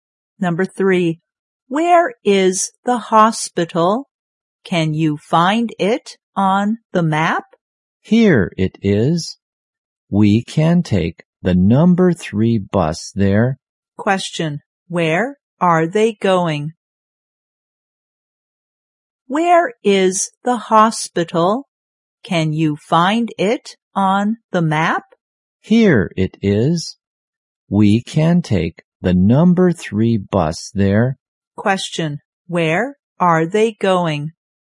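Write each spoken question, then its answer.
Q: where are they going?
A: To the hospital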